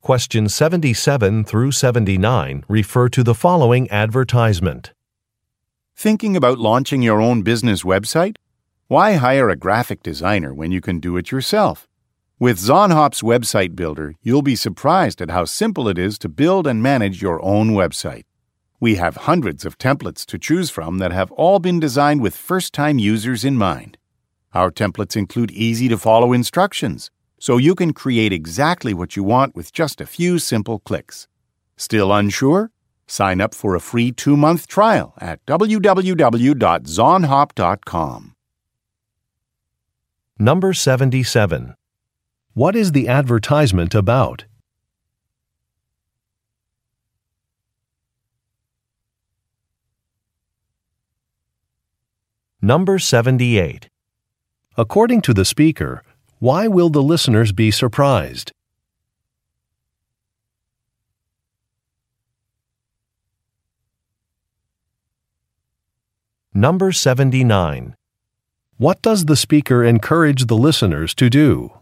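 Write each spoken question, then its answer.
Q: What is the advertisement about?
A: A website-building service

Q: According to the speaker, why will the listeners be surprised?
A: Because building and managing a website is so simple

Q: What does the speaker encourage the listeners to do?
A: Sign up for a free 2-month trial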